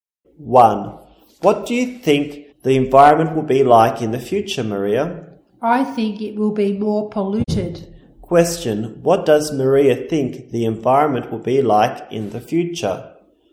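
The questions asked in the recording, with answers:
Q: What does Maria think the environment will be like in the future?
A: It will be more polluted.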